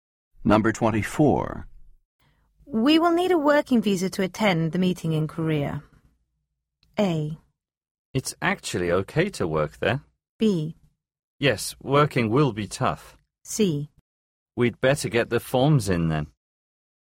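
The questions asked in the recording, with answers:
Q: We will need a working visa to attend the meeting in Korea.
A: C: We'd better get the forms in then.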